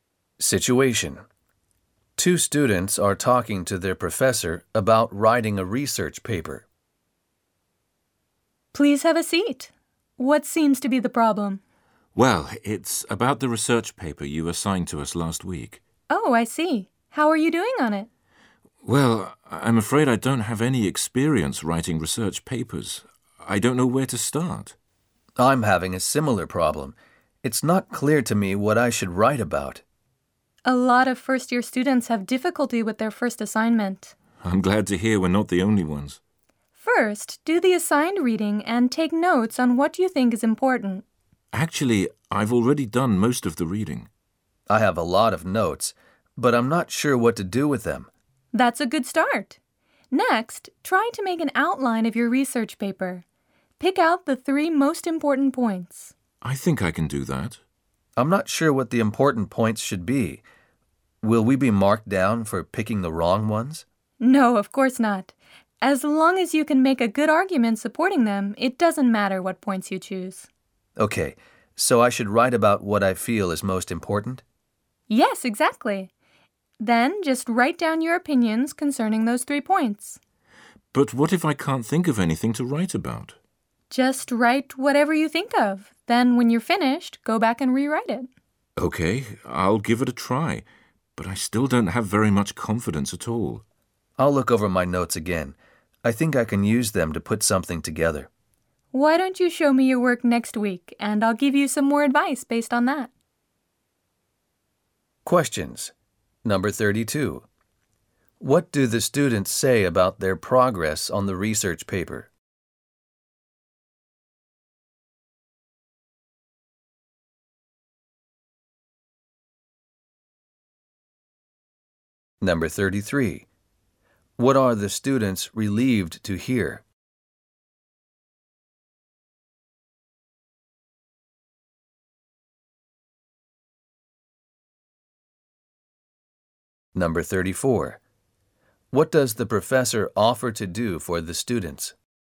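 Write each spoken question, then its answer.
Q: What are the students relieved to hear?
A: That a lot of first-year students have difficulty with their first assignment.

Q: What does the professor offer to do for the students?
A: Look over their work next week and give them more advice based on it.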